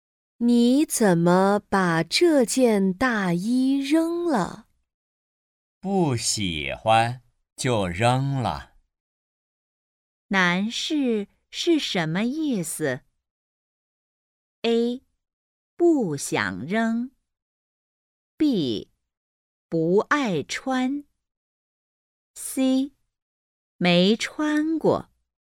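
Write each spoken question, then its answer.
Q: 男士是什么意思?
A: B: 不爱穿。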